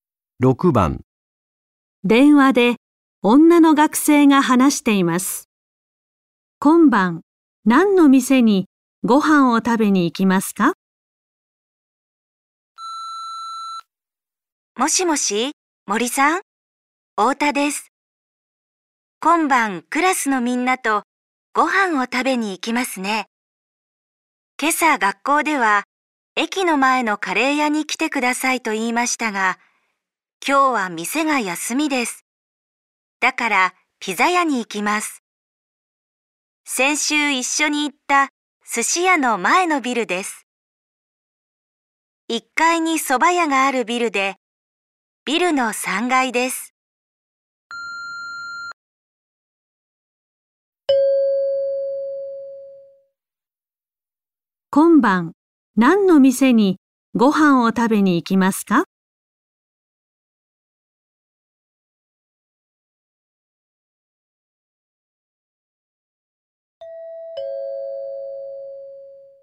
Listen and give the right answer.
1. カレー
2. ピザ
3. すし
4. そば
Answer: 2. ピザ

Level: N5 Listening · Test 1